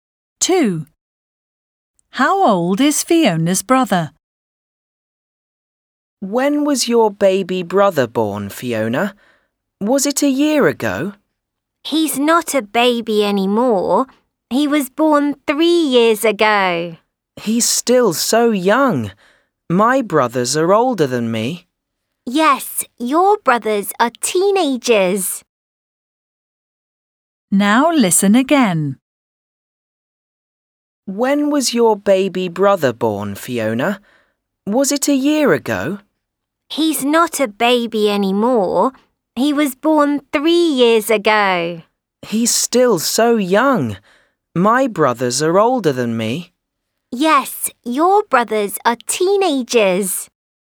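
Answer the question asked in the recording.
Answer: 3 years old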